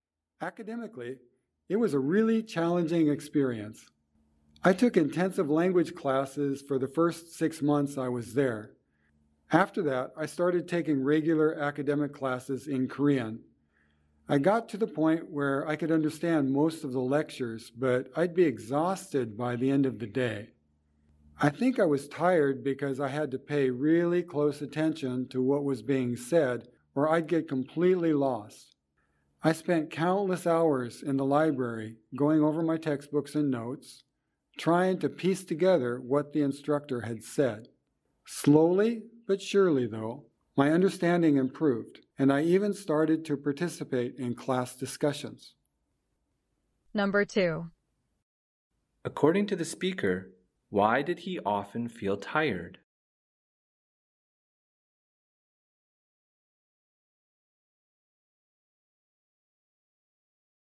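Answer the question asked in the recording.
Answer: He had to pay really close attention to lectures in Korean or he'd get completely lost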